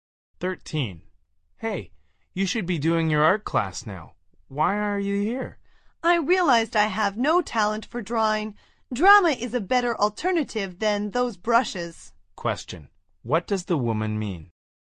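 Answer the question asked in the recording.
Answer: She switched from art to drama class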